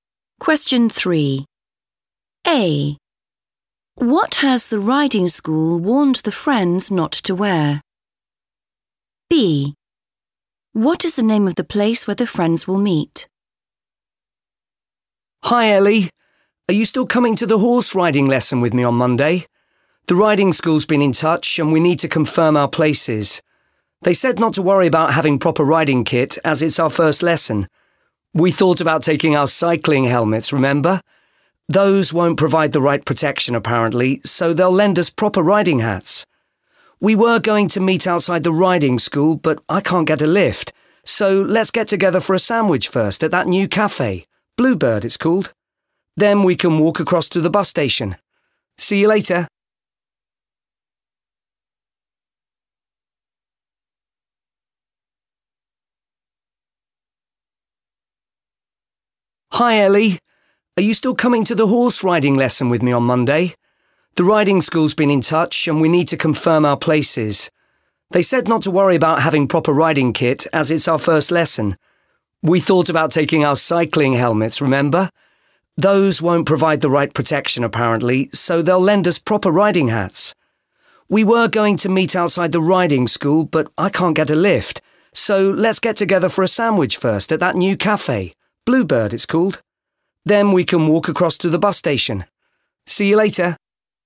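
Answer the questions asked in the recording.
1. cycling helmets
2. Bluebird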